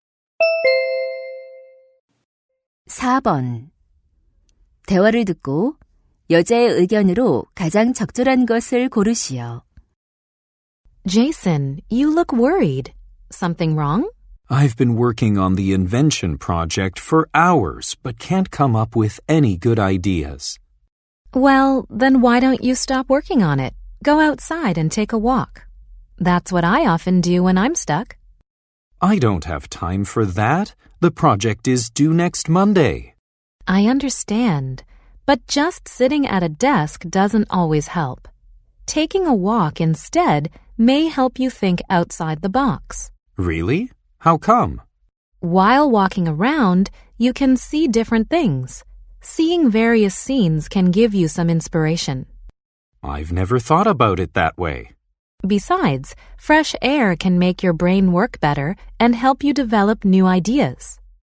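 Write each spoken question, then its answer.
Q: 대화를 듣고 여자의 의견으로 가장 적절한 것을 고르시오.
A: 산책이 창의적인 아이디어를 떠올리는 데 도움이 된다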